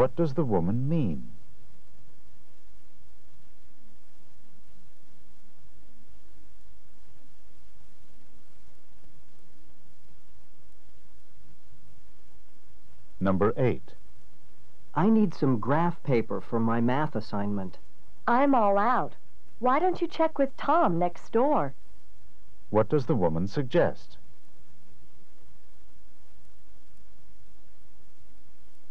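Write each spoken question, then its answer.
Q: What does the woman suggest?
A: Asking Tom next door for graph paper.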